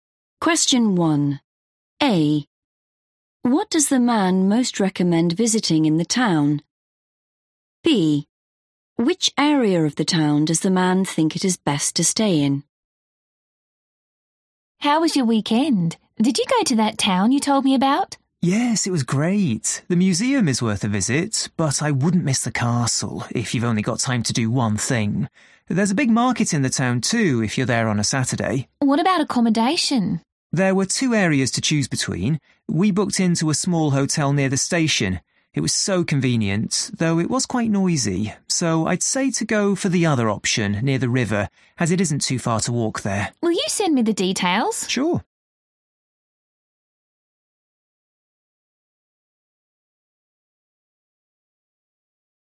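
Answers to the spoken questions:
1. the castle
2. near the river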